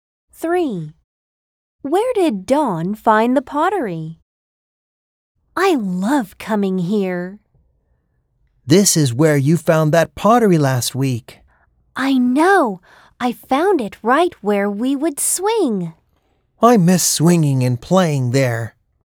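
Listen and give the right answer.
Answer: Where they used to swing (at the swings)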